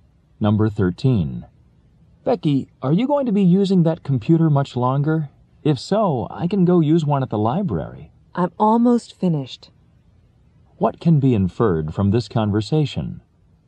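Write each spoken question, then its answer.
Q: What can be inferred from this conversation?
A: Becky will be done with the computer soon, so the man doesn't need to go to the library.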